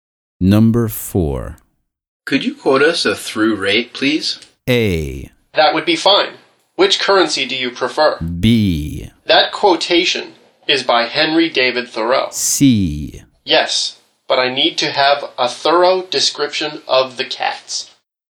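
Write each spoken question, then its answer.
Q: Could you quote us a through rate, please?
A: A: That would be fine. Which currency do you prefer?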